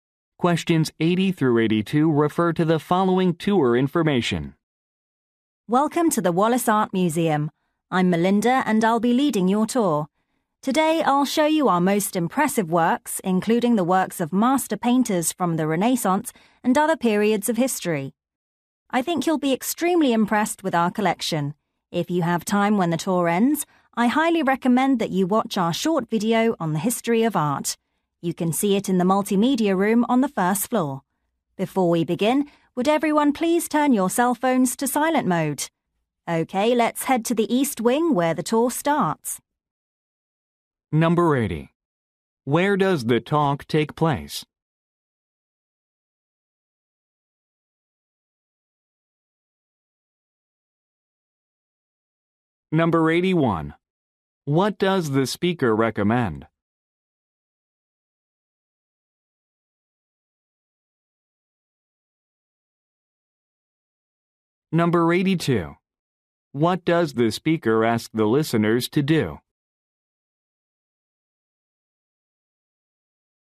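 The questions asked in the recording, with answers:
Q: Where does the talk take place?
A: At an art museum

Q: What does the speaker recommend?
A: Watching a short video on the history of art

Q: What does the speaker ask the listeners to do?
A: Turn their cell phones to silent mode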